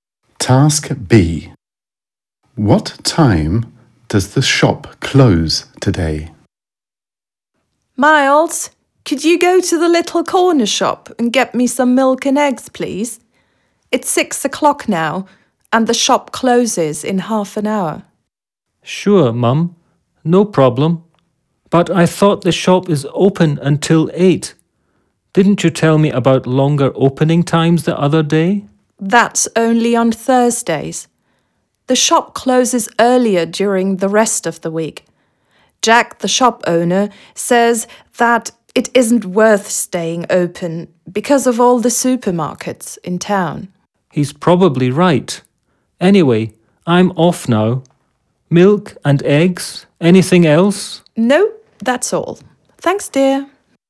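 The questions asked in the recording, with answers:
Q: What time does the shop close today?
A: At half past six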